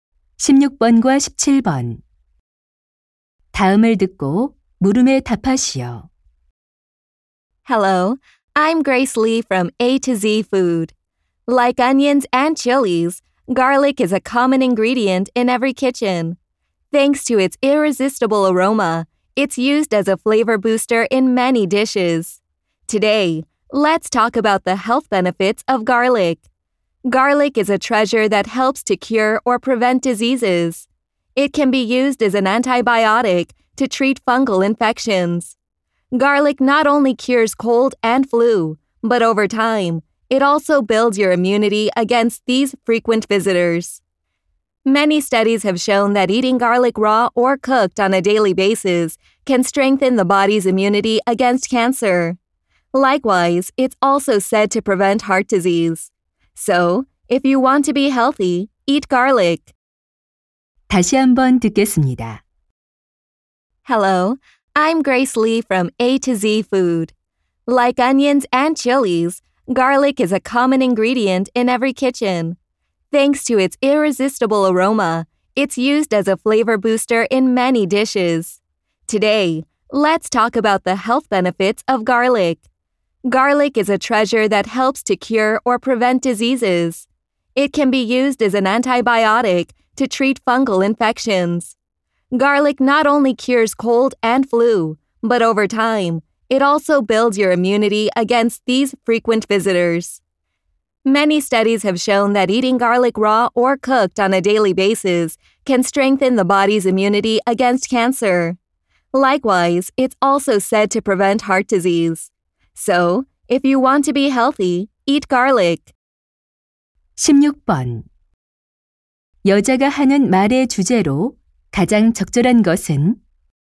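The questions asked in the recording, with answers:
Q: 여자가 하는 말의 주제로 가장 적절한 것은?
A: 마늘의 건강상 이점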